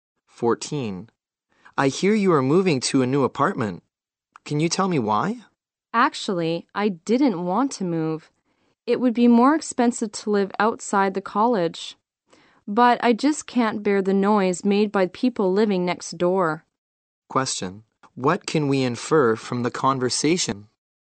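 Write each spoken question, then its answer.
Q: Question. What can we infer from the conversation?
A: The woman is moving because of her noisy neighbors, though it will cost more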